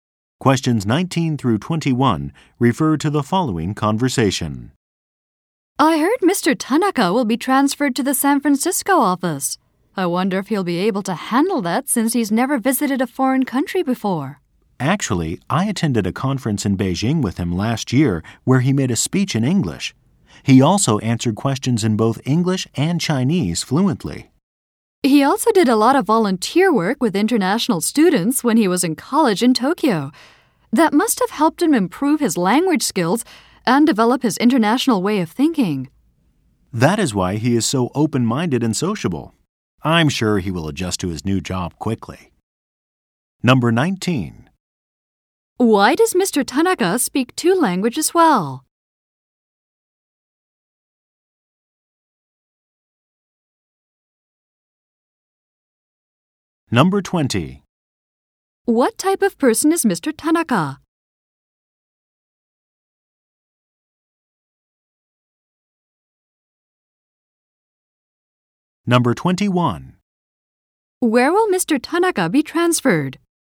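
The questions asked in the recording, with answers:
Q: Why does Mr. Tanaka speak 2 languages well?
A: He did volunteer work with international students in college

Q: What type of person is Mr.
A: Open-minded and sociable

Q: Where will Mr. Tanaka be transferred?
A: The San Francisco office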